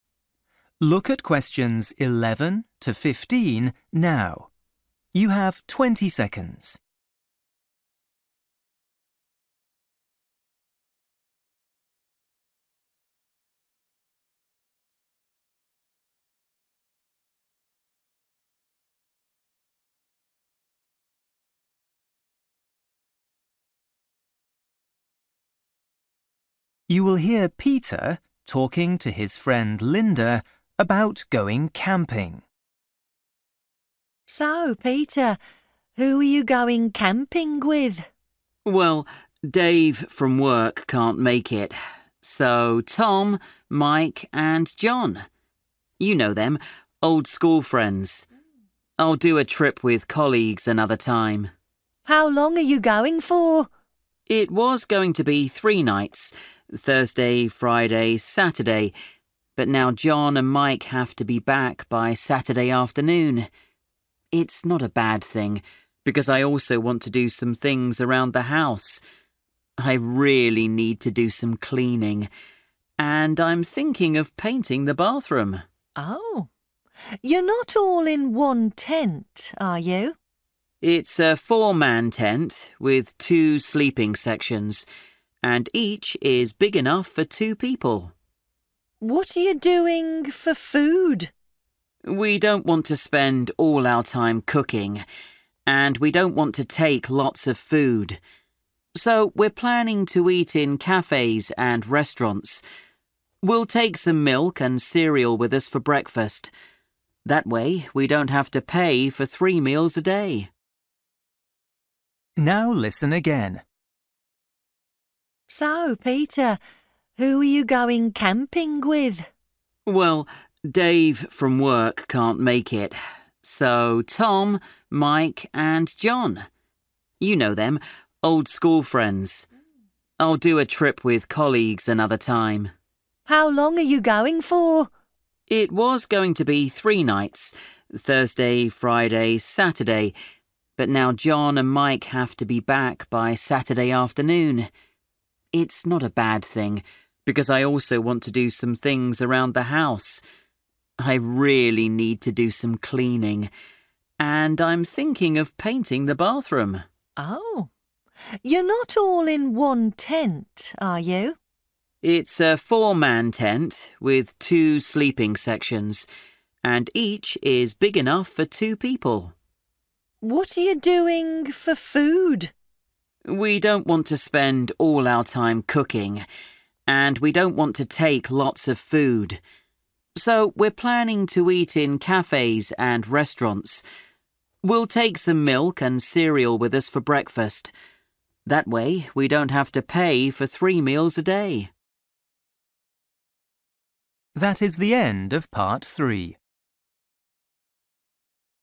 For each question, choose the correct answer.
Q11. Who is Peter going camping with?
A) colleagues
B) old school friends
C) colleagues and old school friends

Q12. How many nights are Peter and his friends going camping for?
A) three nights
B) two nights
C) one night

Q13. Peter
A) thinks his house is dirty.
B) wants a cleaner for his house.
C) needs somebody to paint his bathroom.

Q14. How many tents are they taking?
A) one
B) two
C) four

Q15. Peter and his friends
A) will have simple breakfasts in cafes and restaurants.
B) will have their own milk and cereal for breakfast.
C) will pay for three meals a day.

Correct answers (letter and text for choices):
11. B) old school friends
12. B) two nights
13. A) thinks his house is dirty.
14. A) one
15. B) will have their own milk and cereal for breakfast.

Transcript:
Linda: So, Peter, who are you going camping with?
Peter: Well, Dave from work can't make it, so Tom, Mike and Jon – you know them, old school friends. I'll do a trip with colleagues another time.
Linda: How long are you going for?
Peter: It was going to be three nights – Thursday, Friday, Saturday, but now Jon and Mike have to be back by Saturday afternoon. It's not a bad thing because I also want to do some things around the house. I really need to do some cleaning, and I'm thinking of painting the bathroom.
Linda: Oh. You're not all in one tent, are you?
Peter: It's a four-man tent with two sleeping sections, and each is big enough for two people.
Linda: What you are doing for food?
Peter: We don't want to spend all our time cooking, and we don't want to take lots of food. So we're planning to eat in cafes and restaurants. We'll take some milk and cereal with us for breakfast. That way we don't have to pay for three meals a day.
Now listen again

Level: KET (A2)